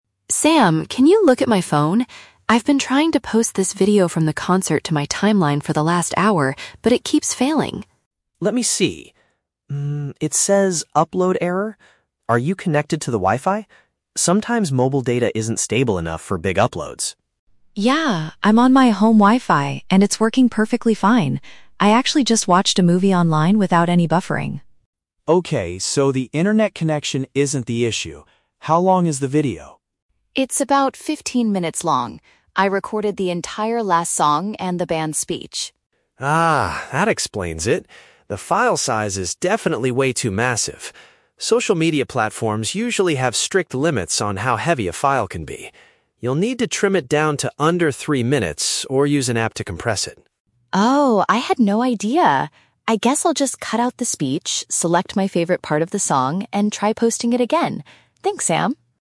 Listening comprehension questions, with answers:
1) Why is Chloe frustrated at the beginning of the conversation?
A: She is unable to share a recording of a live music event online.

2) What does Sam initially suspect is causing the problem?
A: A weak wireless network signal.

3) How will Chloe finally resolve the upload error?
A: By reducing the total length of her media clip.

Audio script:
Chloe: Sam, can you look at my phone? I've been trying to post this video from the concert to my timeline for the last hour, but it keeps failing.
Sam: Let me see. Hm, it says "Upload Error". Are you connected to the Wi-Fi? Sometimes mobile data isn't stable enough for big uploads.
Chloe: Yeah, I'm on my home Wi-Fi and it's working perfectly fine. I actually just watched a movie online without any buffering.
Sam: Okay, so the internet connection isn't the issue. How long is the video?
Chloe: It's about fifteen minutes long. I recorded the entire last song and the band's speech.
Sam: Ah, that explains it! The file size is definitely way too massive. Social media platforms usually have strict limits on how heavy a file can be. You'll need to trim it down to under three minutes or use an app to compress it.
Chloe: Oh, I had no idea. I guess I'll just cut out the speech, select my favorite part of the song, and try posting it again. Thanks, Sam!